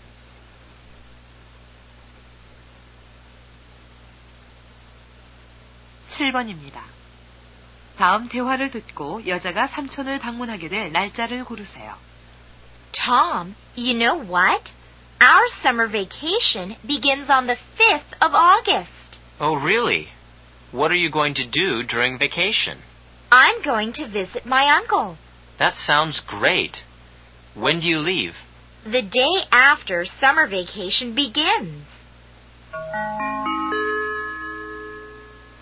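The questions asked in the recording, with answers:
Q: 다음 대화를 듣고 여자가 삼촌을 방문하게 될 날짜를 고르세요.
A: 8월 6일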